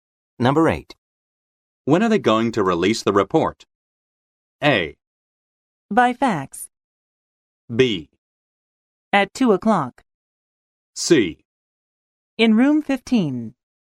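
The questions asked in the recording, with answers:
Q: When are they going to release the report?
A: B: At 2 o'clock.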